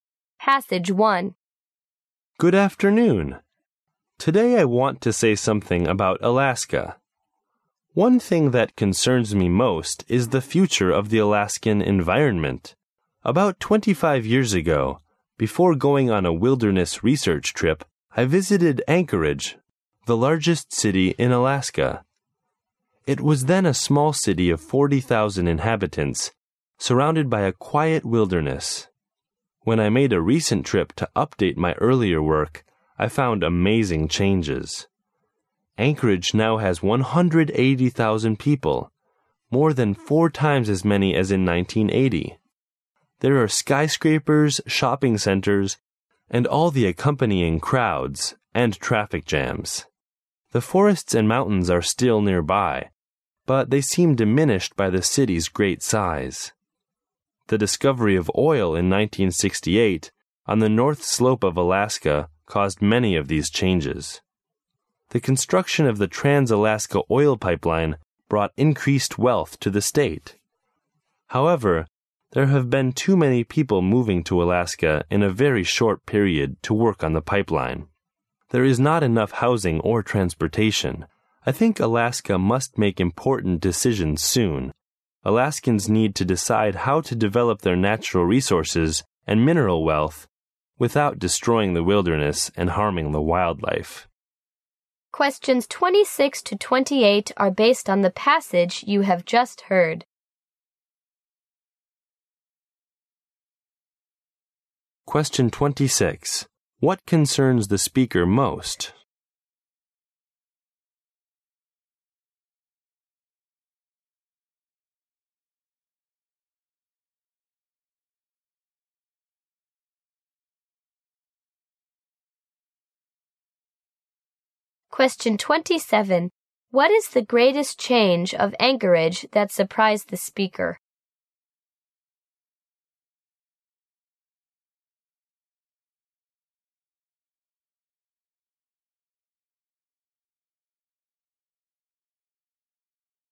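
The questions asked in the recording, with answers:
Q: What concerns the speaker most?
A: The future of the Alaskan environment

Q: What is the greatest change of Anchorage that surprised the speaker?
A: Its population has grown to more than four times its earlier size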